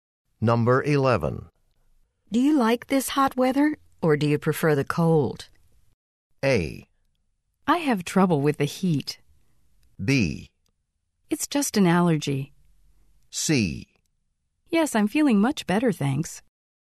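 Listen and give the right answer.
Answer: A: I have trouble with the heat.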